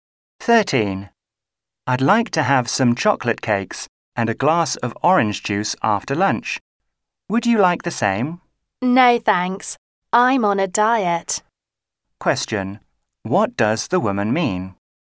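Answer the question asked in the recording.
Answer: She doesn't want cake and juice because she is on a diet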